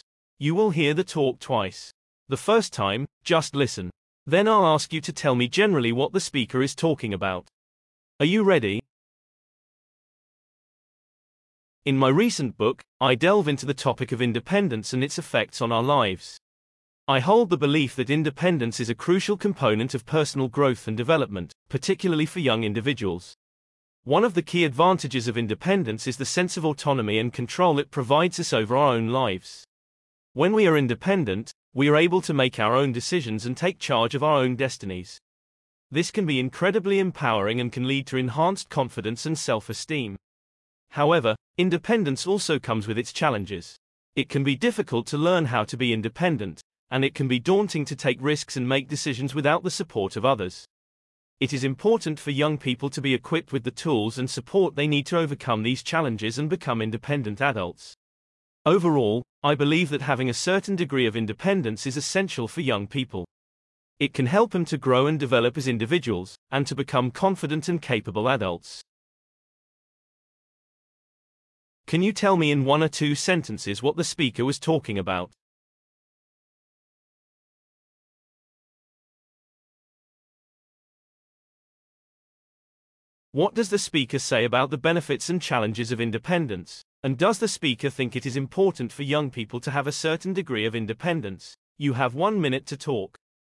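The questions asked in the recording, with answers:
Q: Can you tell me in one or two sentences what the speaker was talking about?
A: The importance of independence for personal growth, especially for young people

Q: What does the speaker say about the benefits and challenges of independence?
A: It gives autonomy, control, confidence and self-esteem, but learning it and making decisions without support can be hard and daunting

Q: And does the speaker think it is important for young people to have a certain degree of independence?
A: Yes, it is essential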